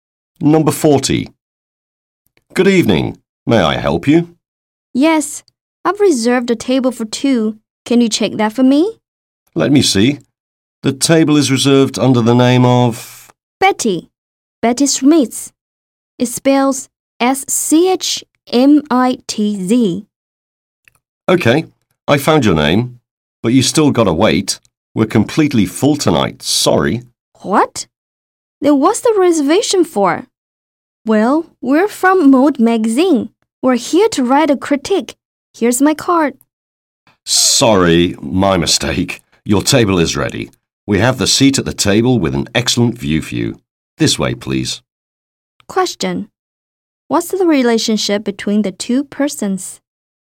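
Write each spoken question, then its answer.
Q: What's the relationship between the two persons?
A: Restaurant host and customer (a magazine critic)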